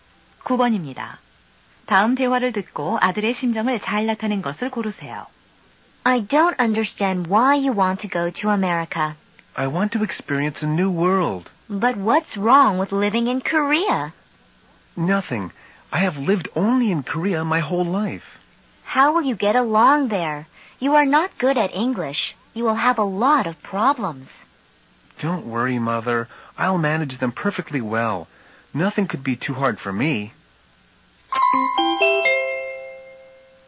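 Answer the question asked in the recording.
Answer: 자신감 있는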